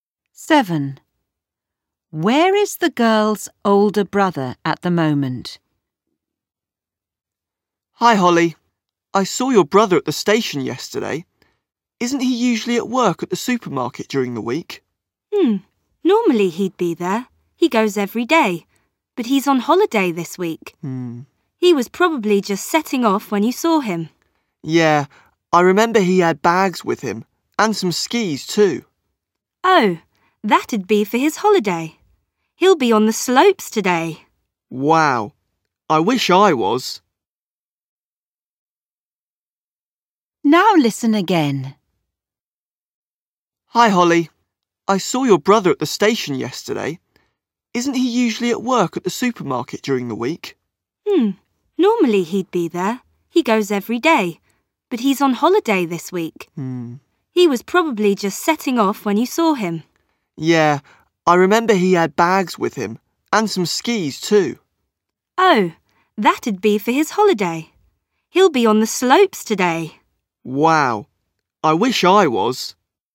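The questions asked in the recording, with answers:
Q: Where is the girl's older brother at the moment?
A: On a skiing holiday, on the slopes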